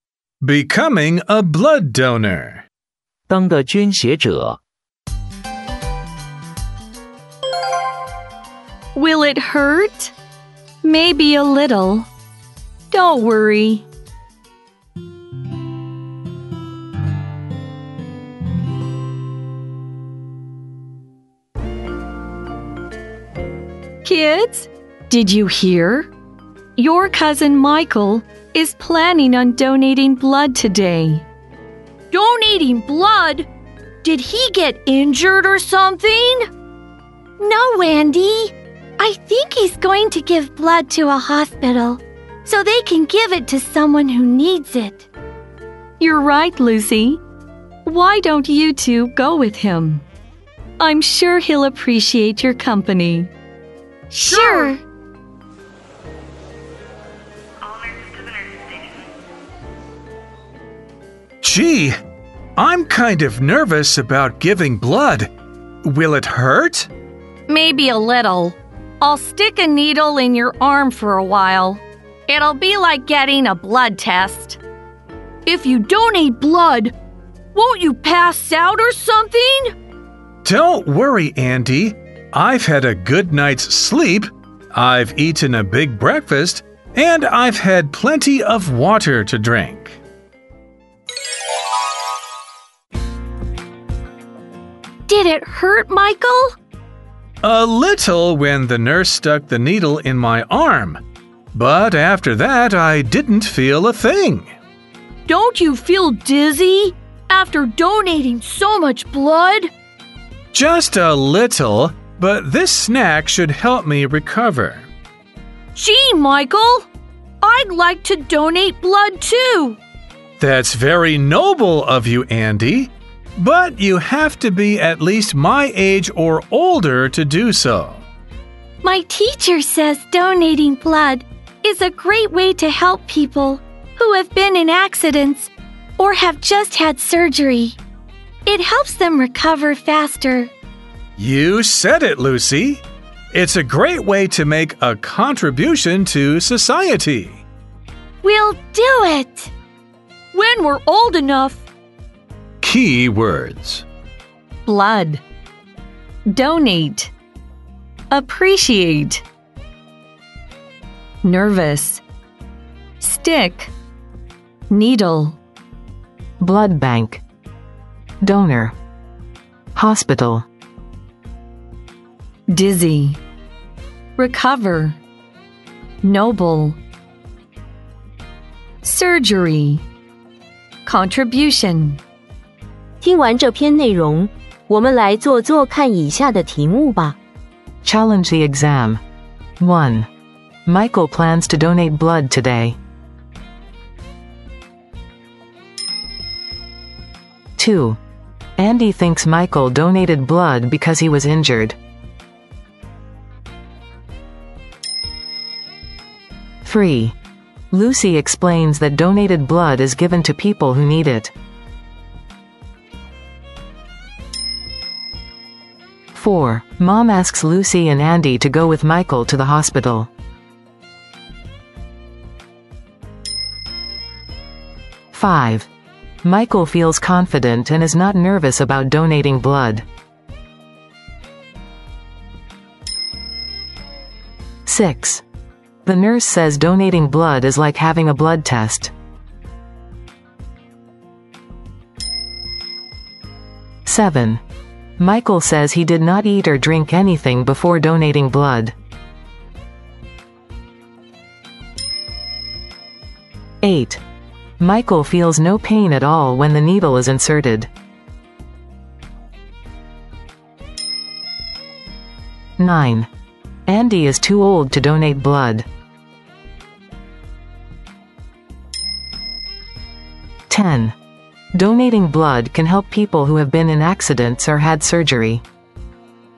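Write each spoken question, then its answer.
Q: Michael plans to donate blood today.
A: True

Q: Andy thinks Michael donated blood because he was injured.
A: True

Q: Lucy explains that donated blood is given to people who need it.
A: True

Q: Mom asks Lucy and Andy to go with Michael to the hospital.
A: True

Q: Michael says he did not eat or drink anything before donating blood.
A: False

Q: Michael feels no pain at all when the needle is inserted.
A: False

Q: Andy is too old to donate blood.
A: False

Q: Donating blood can help people who have been in accidents or had surgery.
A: True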